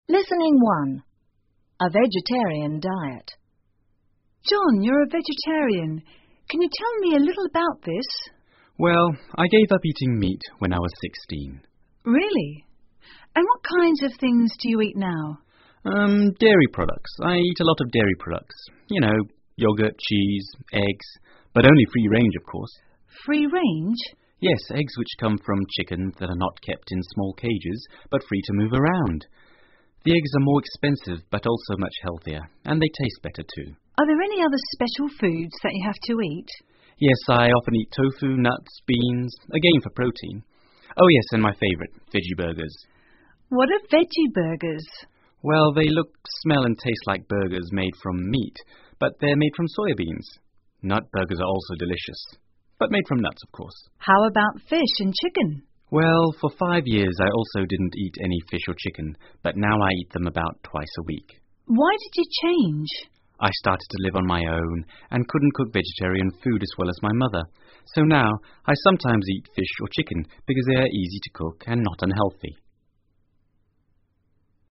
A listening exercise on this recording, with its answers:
下面是对话部分的内容,请再听一次对话,在空格内填入遗漏的部分。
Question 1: John: Yes, eggs which come from _______________that are not kept in small cages but free to move around. The eggs are more ____________but also much___________, and they taste___________, too.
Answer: chickens, expensive, healthier, better

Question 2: J: Well, they ___________, smell and taste like burgers made from meat, but they're made form ________beans. _________________burgers are also delicious...but made from___________, of course.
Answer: Look, soya, Nut, nuts,

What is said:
Interviewer: John, you're a vegetarian. Can you tell me a little about this?
John: Well, I gave up eating meat when I was 16.
I: Really? And what kind of things do you eat now?
J: Urm...dairy products, I eat a lot of dairy products, you know, yogurt, cheese, eggs...but only free-range, of course.
I: Free-range?
J: Yes, eggs which comes from chickens that are not kept in small cages but free to move around. The eggs are more expensive but also much healthier, and they taste better, too.
I: Are there any other special foods that you have to eat?
J: Yes, I often eat tofu, nuts, beans...again for protein...oh yes, and my favourite, veggie-burgers.
I: What are veggie-burgers?
J: Well, they look, smell and taste like burgers made from meat, but they're made from soya beans. Nut burgers are so delicious...but made from nuts, of course.
I: How about fish and chicken?
J: Well, for five years I also didn't eat any fish or chicken but now I eat them about twice a week.
I: Why did you change?
J: I started to live on my own and couldn't cook vegetarian food as well as my mother. So now, I sometimes eat fish or chicken because they are easy to cook and not unhealthy.